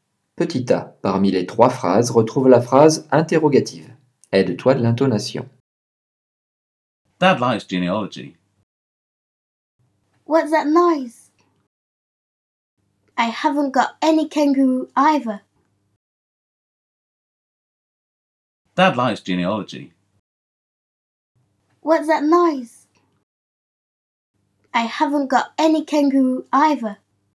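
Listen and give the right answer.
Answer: What's that noise?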